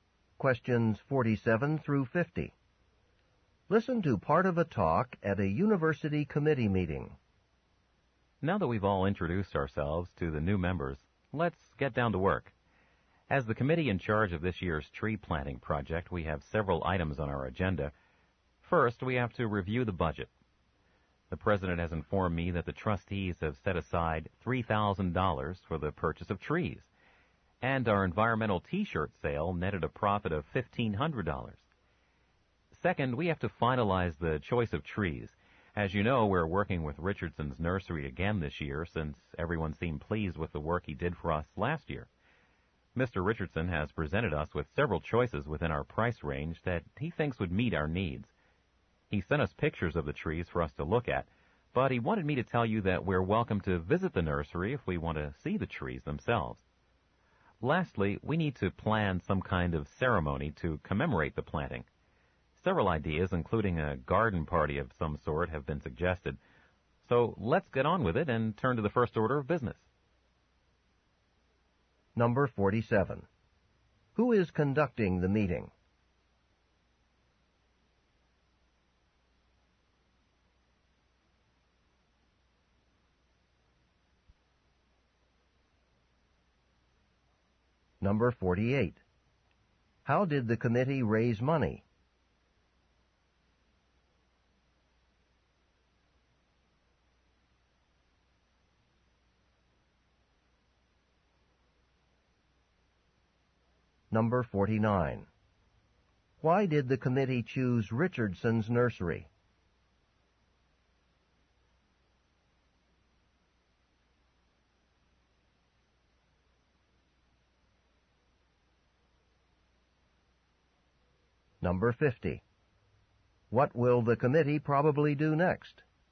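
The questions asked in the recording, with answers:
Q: How did the committee raise money?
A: By selling environmental T-shirts.

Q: Why did the committee choose Richardson's Nursery?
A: Everyone was pleased with its work last year.

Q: What will the committee probably do next?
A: Review the budget.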